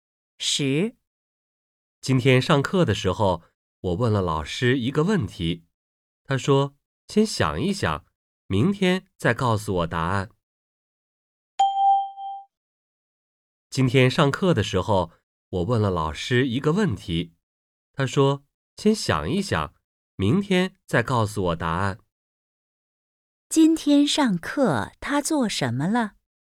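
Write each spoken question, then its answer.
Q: 今天上课他做什么了?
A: 问了老师一个问题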